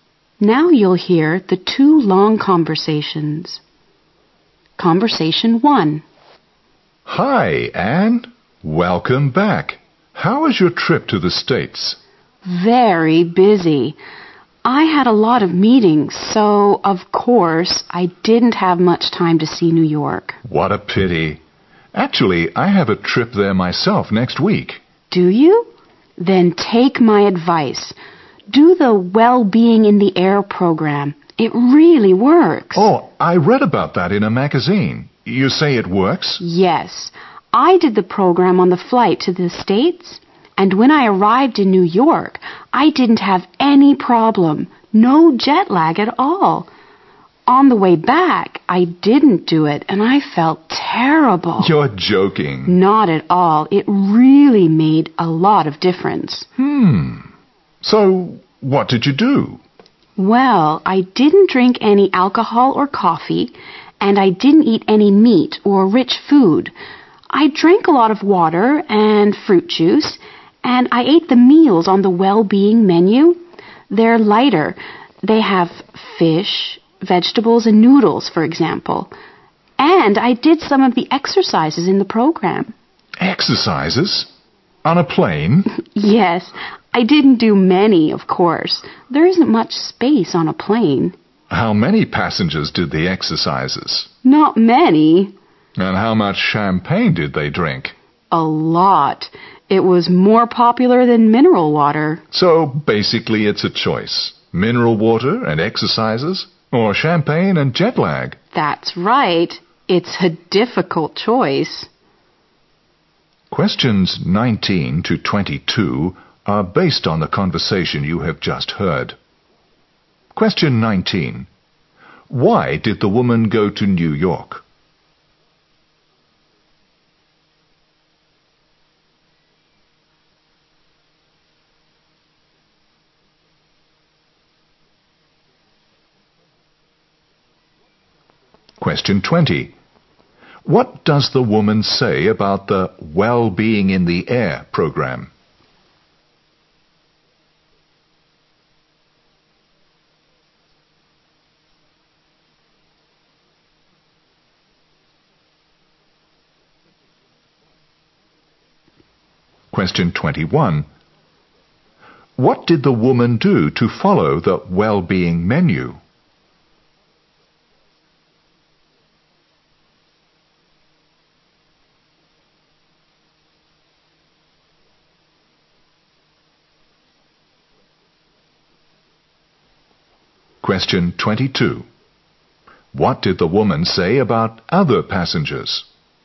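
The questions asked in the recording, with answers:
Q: Why did the woman go to New York?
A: For business meetings

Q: What does the woman say about the Well-Being in the Air program?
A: It really works; it prevents jet lag

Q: What did the woman do to follow the Well-Being menu?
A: She ate light food such as fish, vegetables and noodles, and drank water and juice instead of alcohol or coffee

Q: What did the woman say about other passengers?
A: Few did the exercises; many drank champagne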